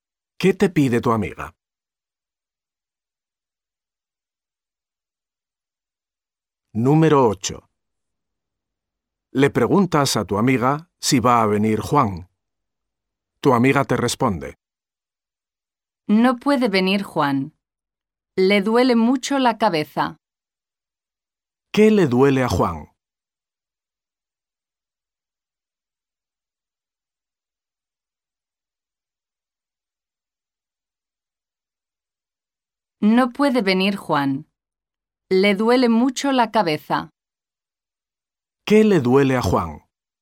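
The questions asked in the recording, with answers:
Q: ¿Qué le duele a Juan?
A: La cabeza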